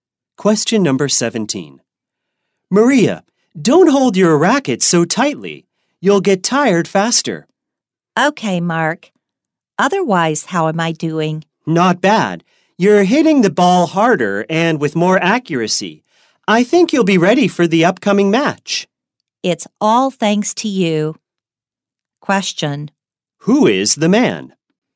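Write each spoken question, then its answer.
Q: Who is the man?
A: Maria's tennis coach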